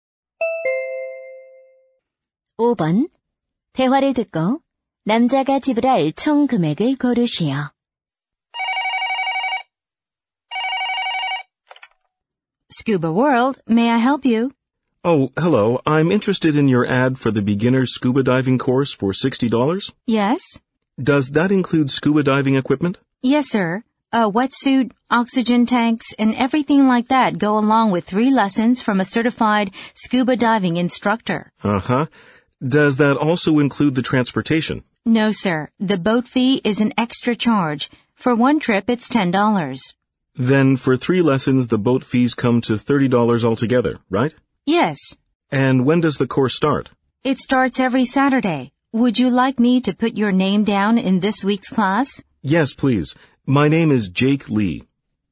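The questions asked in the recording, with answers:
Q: 대화를 듣고 남자가 지불할 총 금액을 고르시오.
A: $90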